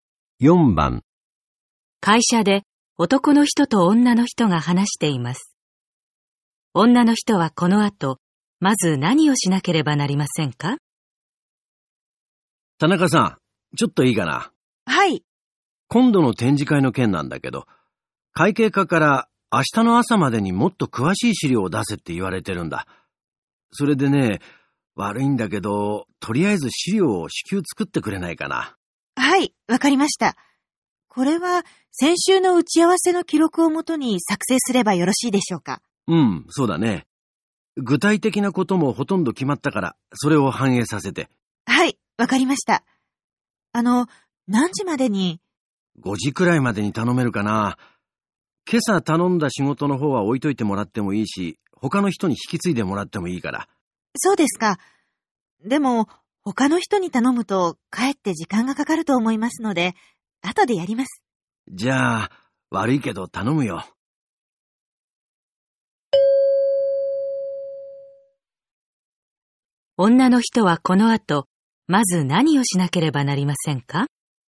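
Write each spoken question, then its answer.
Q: 女の人はこの後、まず何をしなければなりませんか?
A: 展示会の詳しい資料を作成する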